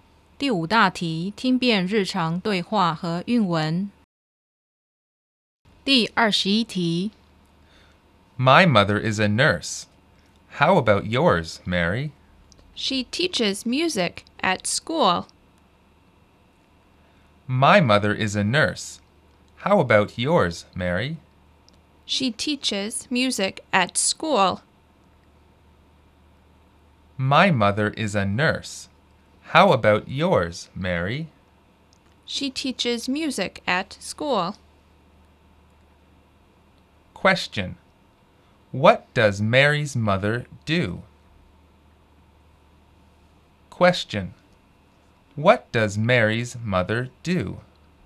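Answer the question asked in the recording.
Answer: She teaches music at school (a music teacher).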